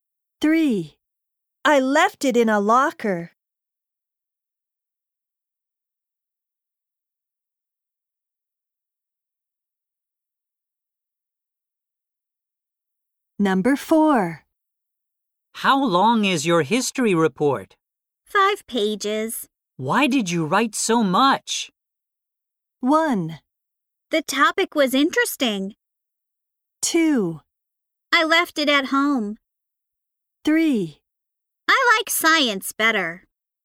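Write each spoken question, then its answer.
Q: Why did you write so much?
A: 1: The topic was interesting.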